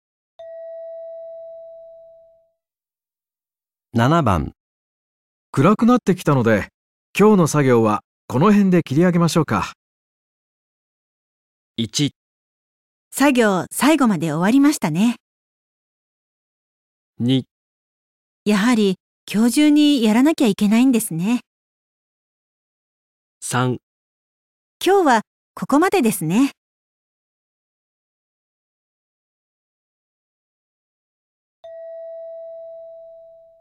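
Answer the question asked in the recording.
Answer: 3: 今日はここまでですね。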